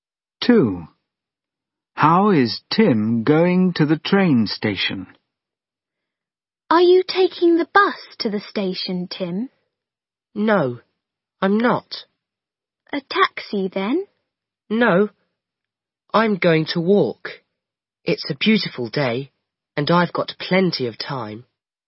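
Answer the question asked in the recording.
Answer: walking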